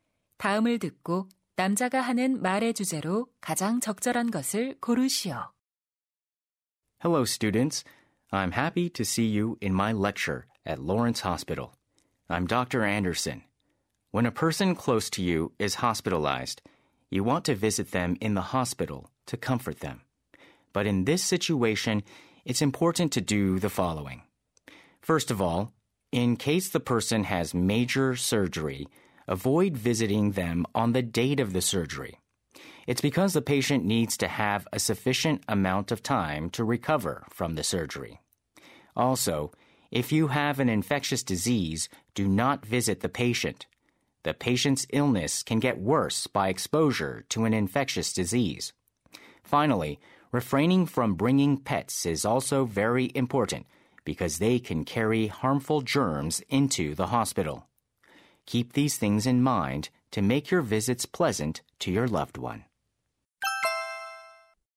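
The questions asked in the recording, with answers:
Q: 다음을 듣고 남자가 하는 말의 주제로 가장 적절한 것을 고르시오.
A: 입원한 환자를 병문안할 때 유의할 점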